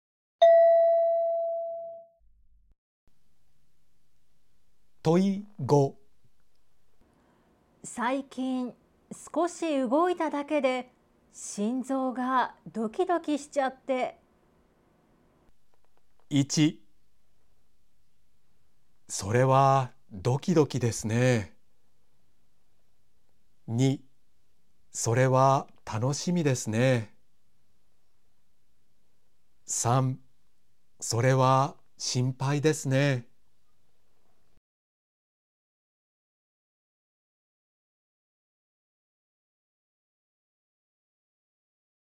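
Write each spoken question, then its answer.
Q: 最近少し動いただけで心臓がドキドキしちゃって。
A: 3: それは心配ですね。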